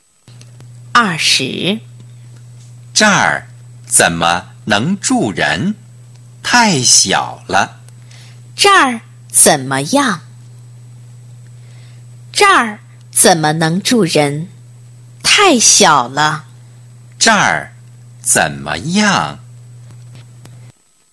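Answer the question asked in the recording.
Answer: 太小了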